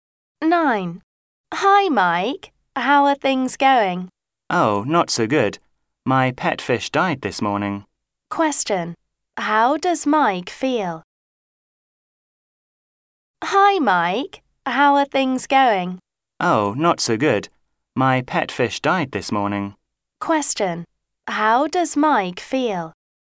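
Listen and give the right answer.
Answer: Sad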